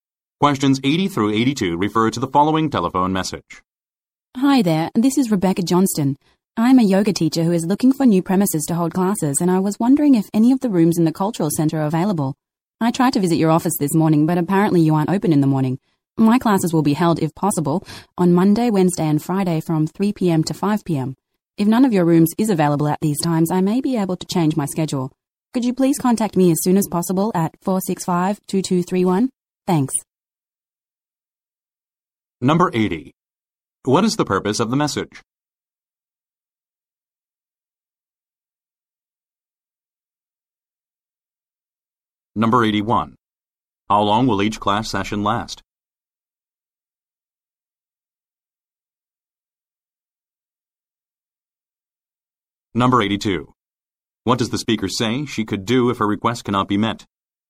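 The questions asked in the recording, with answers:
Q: What is the purpose of the message?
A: To ask about renting a room for yoga classes

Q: How long will each class session last?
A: Two hours

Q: What does the speaker say she could do if her request cannot be met?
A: Change her schedule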